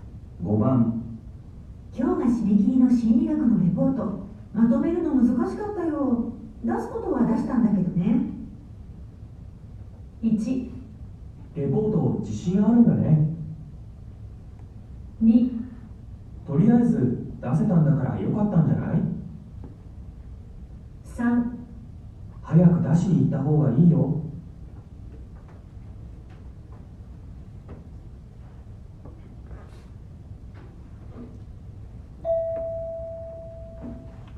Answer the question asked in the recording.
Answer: 2

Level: N1 Listening · Test 2